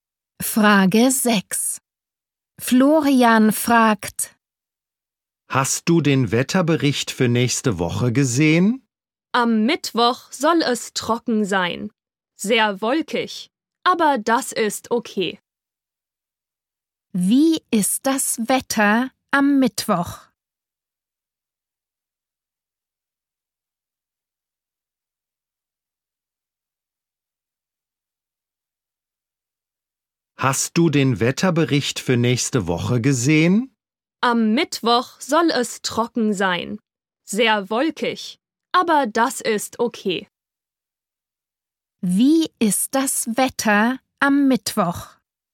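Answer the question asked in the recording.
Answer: Trocken, aber sehr wolkig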